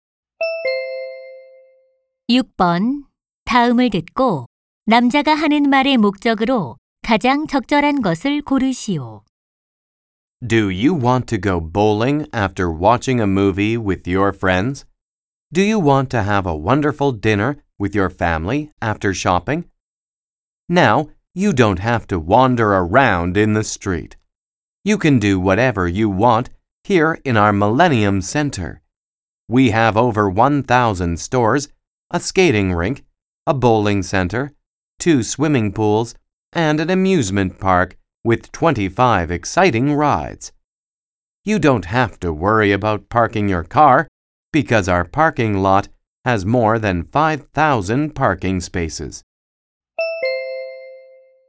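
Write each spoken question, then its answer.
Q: 다음을 듣고 남자가 하는 말의 목적으로 가장 적절한 것을 고르시오.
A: 밀레니엄 센터 홍보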